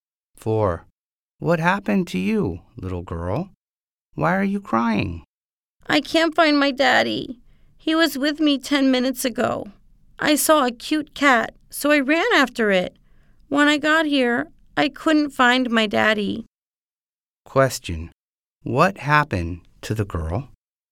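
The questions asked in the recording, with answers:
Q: What happened to the girl?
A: She couldn't find her daddy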